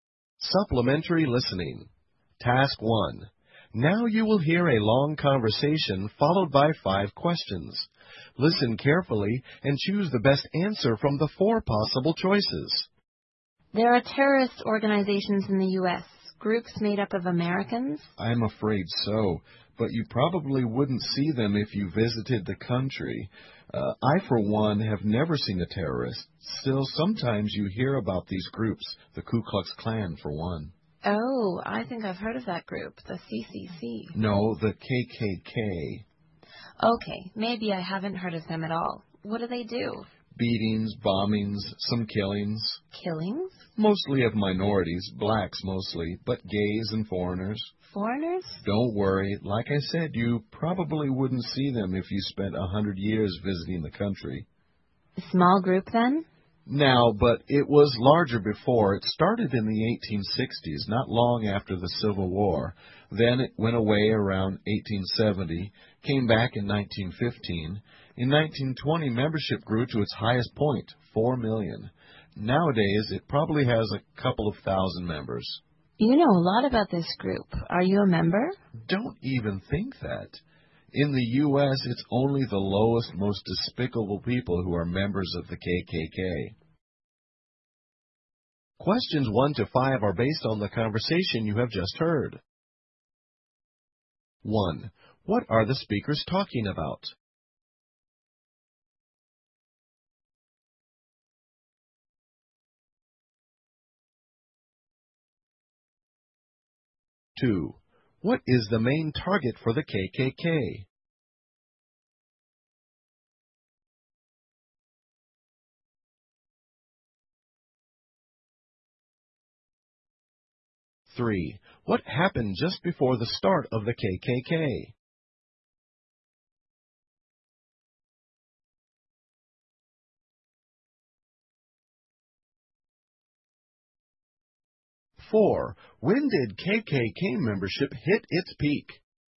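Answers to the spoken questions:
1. The Ku Klux Klan (KKK).
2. Minorities, mostly blacks.
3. The Civil War.
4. In 1920.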